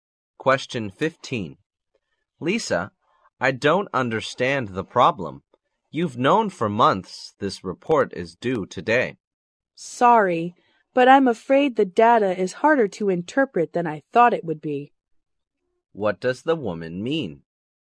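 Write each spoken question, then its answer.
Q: What does the woman mean?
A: The data was harder to interpret than she expected, so the report isn't finished.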